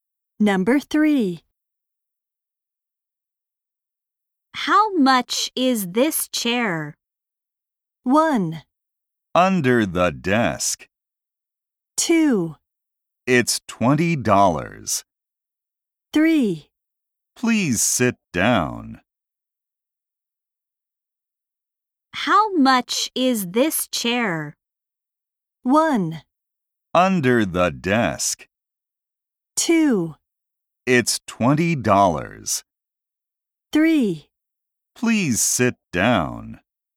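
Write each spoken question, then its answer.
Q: How much is this chair?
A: 2: It's $20.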